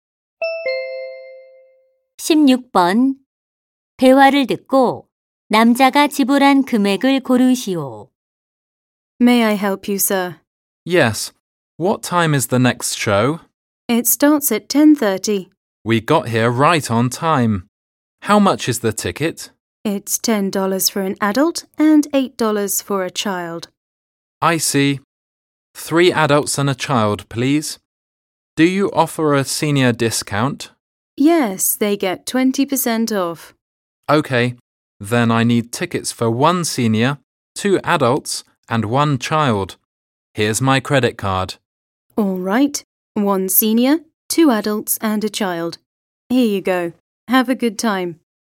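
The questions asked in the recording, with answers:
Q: 대화를 듣고 남자가 지불한 금액을 고르시오.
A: $36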